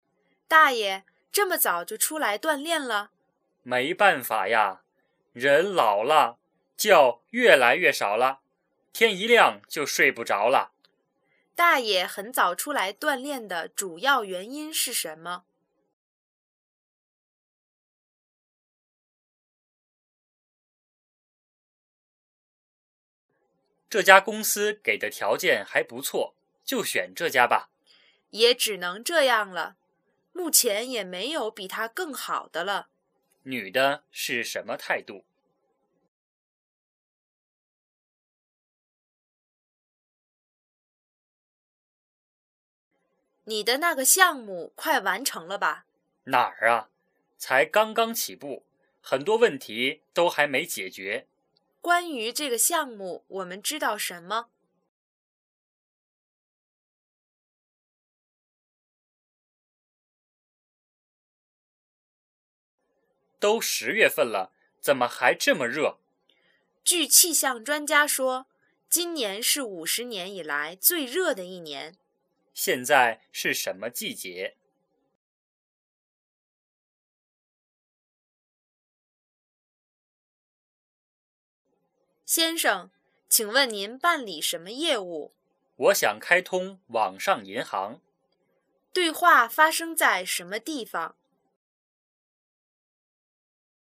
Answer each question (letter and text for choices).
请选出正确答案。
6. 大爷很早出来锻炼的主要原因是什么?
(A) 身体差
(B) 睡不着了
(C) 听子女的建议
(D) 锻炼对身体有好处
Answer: (B) 睡不着了

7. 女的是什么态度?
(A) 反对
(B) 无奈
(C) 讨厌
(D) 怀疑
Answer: (B) 无奈

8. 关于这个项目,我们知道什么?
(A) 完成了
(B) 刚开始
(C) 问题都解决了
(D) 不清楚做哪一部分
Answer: (B) 刚开始

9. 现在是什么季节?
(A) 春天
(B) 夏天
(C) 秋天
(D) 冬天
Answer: (C) 秋天

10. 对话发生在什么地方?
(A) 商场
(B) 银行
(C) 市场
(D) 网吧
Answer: (B) 银行

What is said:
女:大爷,这么早就出来锻炼了。
男:没办法呀,人老了,觉越来越少了,天一亮就睡不着了。
问:大爷很早出来锻炼的主要原因是什么?
男:这家公司给的条件还不错,就选这家吧。
女:也只能这样了,目前也没有比它更好的了。
问:女的是什么态度?
女:你的那个项目快完成了吧?
男:哪儿啊?才刚刚起步,很多问题都还没解决。
问:关于这个项目,我们知道什么?
男:都十月份了,怎么还这么热?
女:据气象专家说,今年是50年以来最热的一年。
问:现在是什么季节?
女:先生,请问您办理什么业务?
男:我想开通网上银行。
问:对话发生在什么地方?

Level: 汉语水平考试(HSK)五级